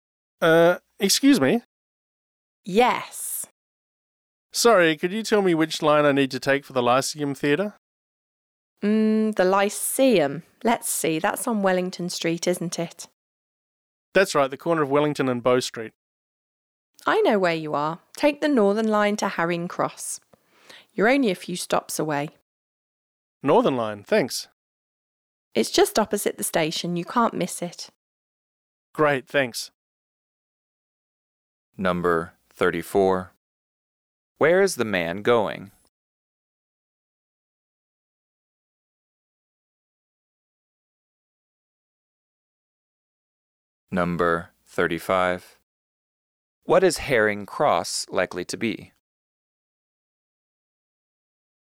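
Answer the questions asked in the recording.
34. To the Lyceum Theatre
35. An underground (tube) station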